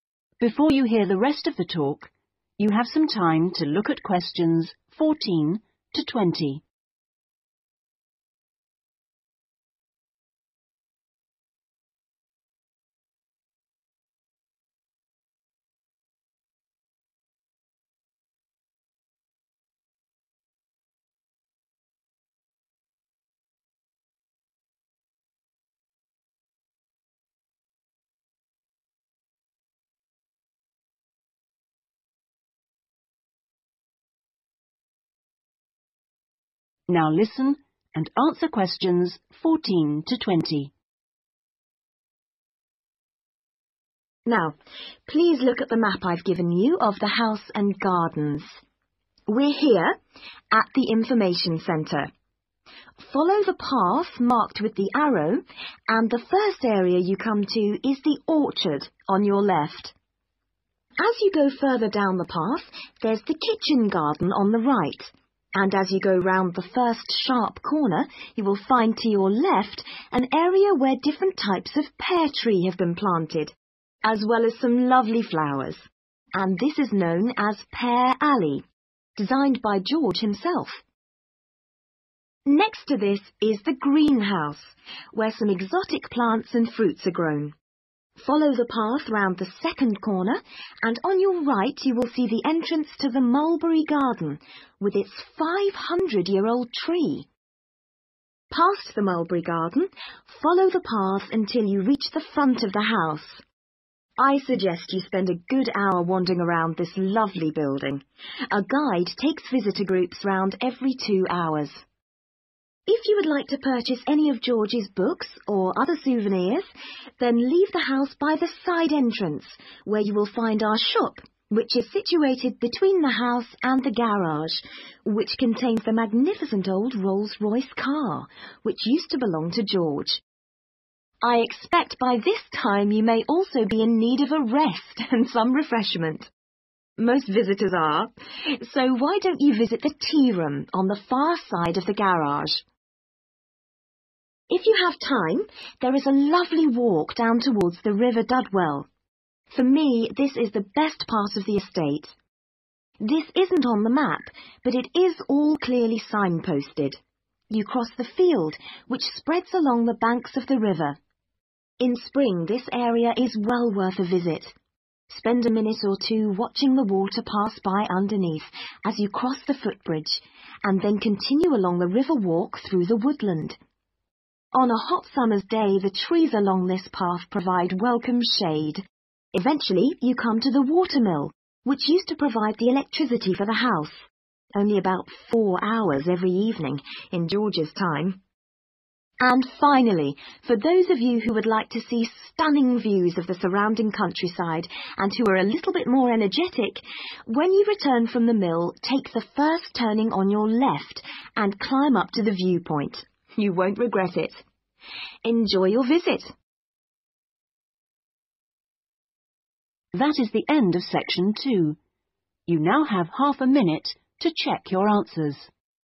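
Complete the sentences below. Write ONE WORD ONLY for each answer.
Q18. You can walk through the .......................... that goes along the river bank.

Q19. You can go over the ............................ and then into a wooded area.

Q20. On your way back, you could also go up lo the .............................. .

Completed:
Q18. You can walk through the field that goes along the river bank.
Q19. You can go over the footbridge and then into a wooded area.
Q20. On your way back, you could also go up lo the viewpoint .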